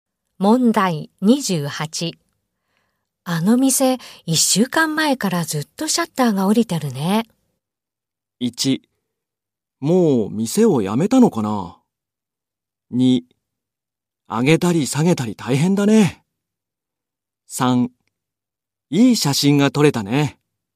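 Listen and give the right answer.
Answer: 1: もう店を辞めたのかな?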